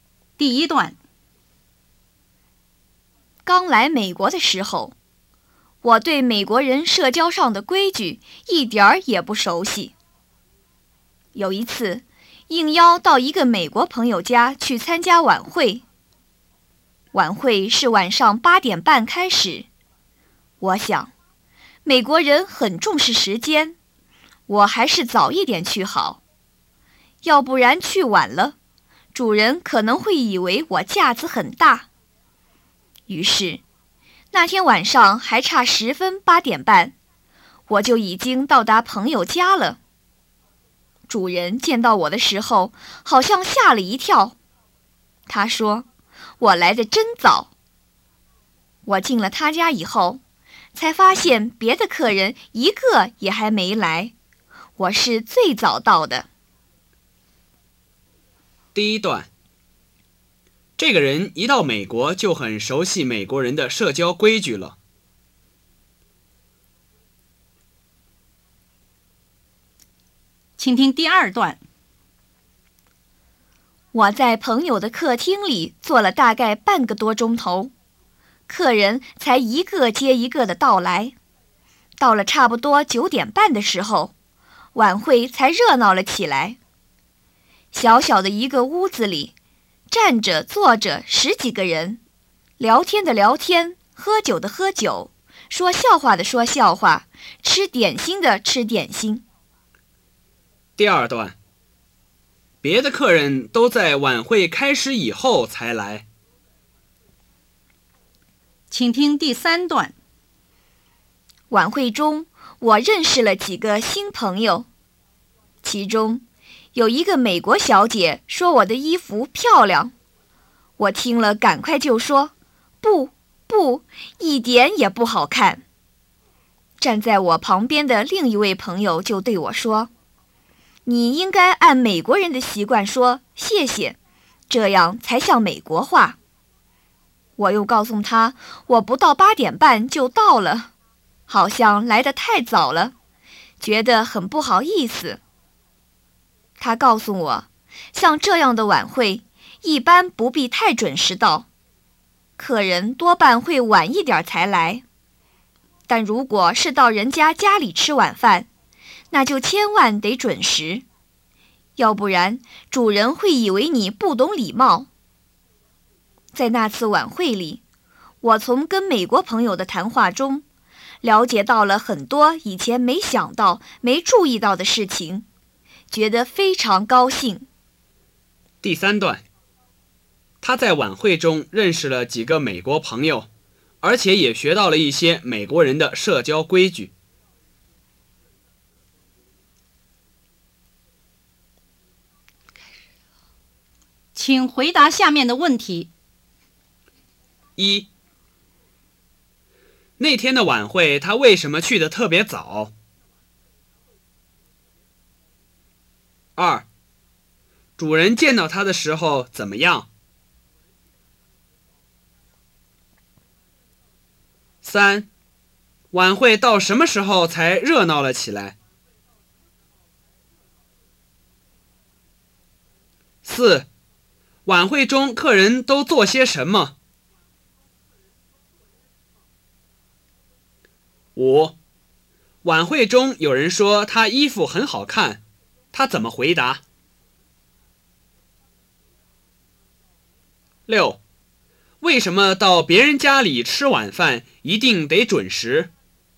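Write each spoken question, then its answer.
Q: 那天的晚会他为什么去得特别早?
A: 他想美国人很重视时间,去晚了主人可能会以为他架子很大

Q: 主人见到他的时候怎么样?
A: 好像吓了一跳,说他来得真早

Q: 晚会到什么时候才热闹了起来?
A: 差不多9:30的时候

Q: 晚会中客人都做些什么?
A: 聊天、喝酒、说笑话、吃点心

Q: 晚会中有人说他衣服很好看,他怎么回答?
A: 不,不,一点也不好看

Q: 为什么到别人家里吃晚饭一定得准时?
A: 要不然主人会以为你不懂礼貌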